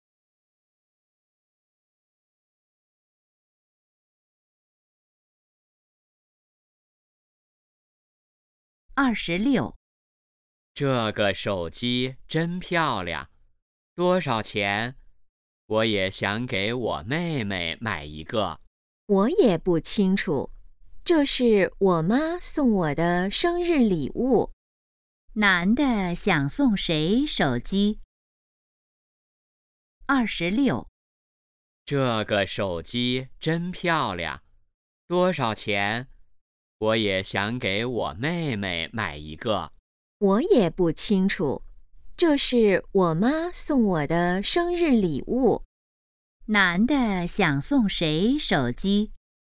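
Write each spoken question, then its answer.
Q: 男的想送谁手机?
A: 妹妹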